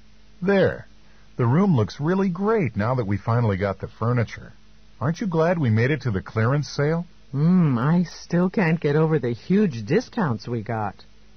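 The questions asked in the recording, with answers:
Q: What does the woman mean?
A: She is still amazed at how much they saved on the furniture.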